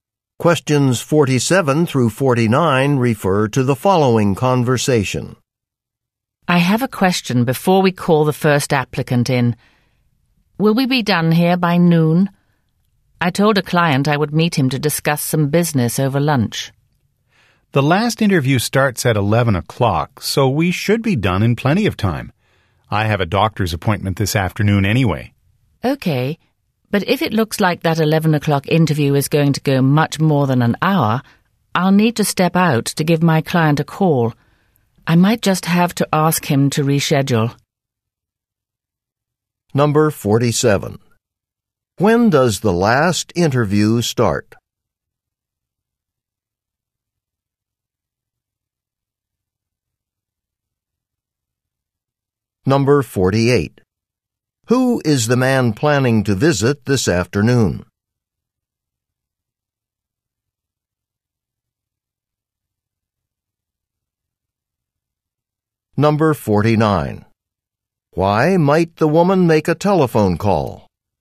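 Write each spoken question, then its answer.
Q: When does the last interview start?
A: At 11 o'clock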